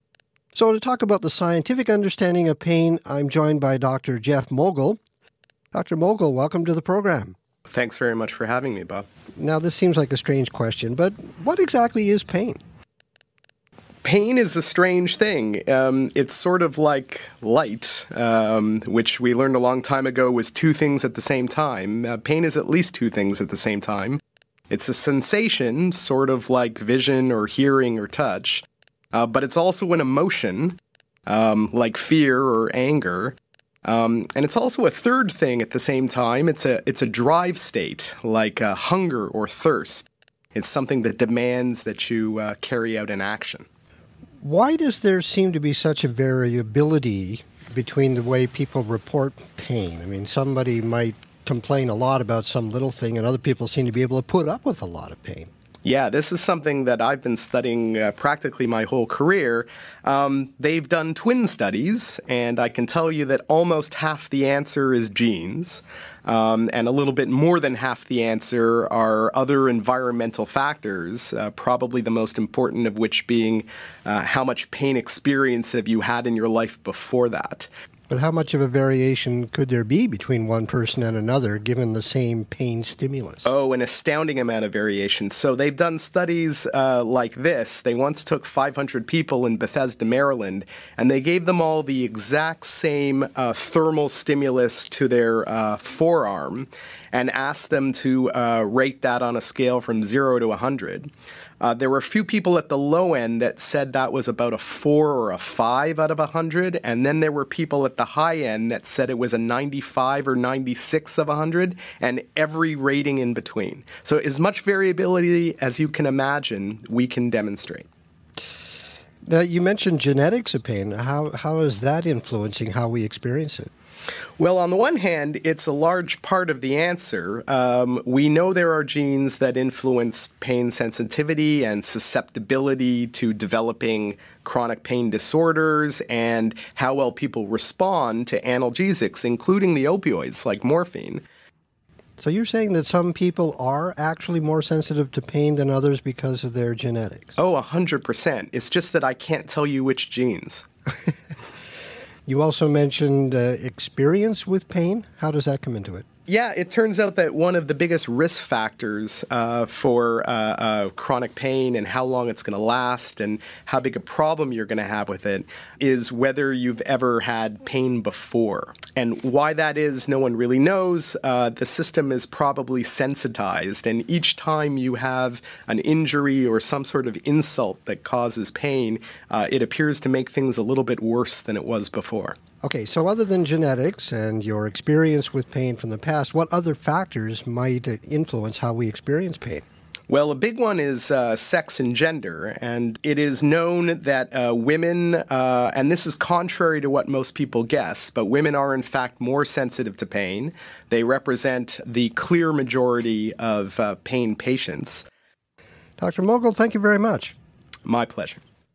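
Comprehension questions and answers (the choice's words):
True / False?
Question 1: Pain is only a physical sensation like touch or hearing.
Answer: False

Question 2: Most people experience pain in the same way.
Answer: False

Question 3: Almost half of the variability in pain sensitivity is influenced by genetics.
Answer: True

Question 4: Past experience with pain has little effect on how a person experiences pain in the future.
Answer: False

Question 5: In a study, people rated the pain that they experienced from the same stimulus quite differently.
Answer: True

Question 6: The largest factor determining chronic pain is a person's gender.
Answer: False

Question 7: Most people assume that men are more sensitive to pain than women.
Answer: True

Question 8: What is the discussion mainly about?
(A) How people can cope with pain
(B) The factors influencing people's experience with pain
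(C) The most recent scientific discoveries related to pain medication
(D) The differences between pain and light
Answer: The factors influencing people's experience with pain

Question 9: Why does the professor compare pain to light?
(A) Because pain has many different properties.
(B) Because pain is difficult to measure.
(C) Because pain travels quickly through your body.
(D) Because pain and light are both caused by photons.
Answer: Because pain has many different properties.

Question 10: Why is pain a drive-state?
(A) It can make people feel hungry or thirsty.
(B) It lasts for a long time.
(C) It is related to hunger.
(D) It forces people to respond to it.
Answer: It forces people to respond to it.

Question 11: Having a lot of expereince with pain ______.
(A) makes you more sensitive to pain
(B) makes you less sensitive to pain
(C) has no effect on your sensitivity to pain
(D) made people less likely to participate in the experience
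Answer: makes you more sensitive to pain

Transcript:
So to talk about the scientific understanding of pain I'm joined by Dr. Dr. Mogil welcome to the program.
Thanks very much for having me, Bob.
Now this seems like a strange question, but what exactly is pain?
Pain is a strange thing. It's sort of like lights, which we learned a long time ago was two things at the same time. Pain is at least two things at the same time. It's a sensation, sort of like vision or hearing or touch. But it's also an emotion like fear or anger. And it's also a third thing at the same time. It's a drive state like hunger or thirst. It's something that demands that you carry out an action.
Why is it so hard then to measure a person's pain?
Why does there seem to be such a variability between the way people report pain? I mean, somebody might complain a lot about some little thing and other people seem to be able to put up with a lot of pain.
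Yeah, this is something that I've been studying practically my whole career. They've done twin studies, and I can tell you that almost half the answer is genes. And a little bit more than half the answer are other environmental factors, probably the most important of which being how much pain experience have you had in your life before that.
How much of a variation could there be between one person and another given the same pain stimulus?
Oh an astounding amount of variation. So they've done studies like this. They once took 500 people in Bethesda, Maryland, and they gave them all the exact same thermal stimulus to their forearm and asked them to rate that on a scale from zero to 100. There were a few people at the low end that said that was about a four or a five out of 100. And then there were people at the high end that said it was a 95 or 96 of a hundred and every rating in between. 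So as much variability as you can imagine, we can demonstrate.
Now you mentioned genetics of pain. How is that influencing how we experience it?
Well on the one hand it's a large part of the answer. We know there are genes that influence pain sensitivity and susceptibility to developing chronic pain disorders and how well people respond to analgesics including the opioids like morphine.
So you're saying that some people are actually more sensitive to pain than others because of their genetics.
Oh 100 percent. It's just that I can't tell you which genes.
You also mentioned experience with pain. How does that come into it.
Yeah, it turns out that one of the biggest risk factors for chronic pain and how long it's going to last and how big a problem you're going to have with it is whether you've ever had pain before. And why that is no one really knows. The system is probably sensitized, and each time you have an injury or some sort of insult that causes pain, it appears to make things a little bit worse than it was before.
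Okay, so other than genetics and your experience with pain from the past, what other factors might influence how we experience pain?
Well, the big one is sex and gender, and it is known that women, and this is contrary to what most people guess, but women are in fact more sensitive to pain. They represent the clear majority of pain patients.
Dr. Mogil, thank you very much.
My pleasure.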